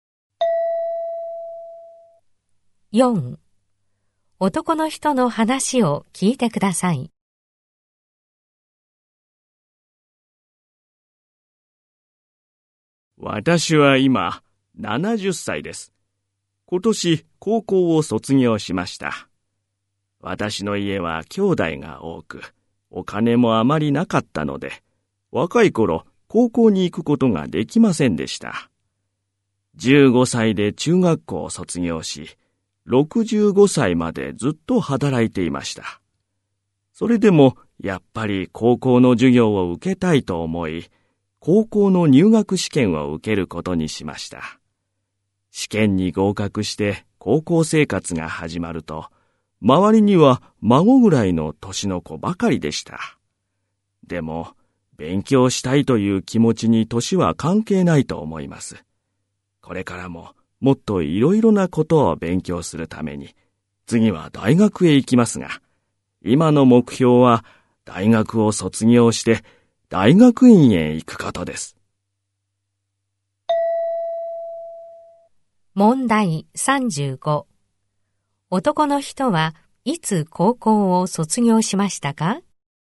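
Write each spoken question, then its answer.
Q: 男の人はいつ高校を卒業しましたか?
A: 今年(70歳の時)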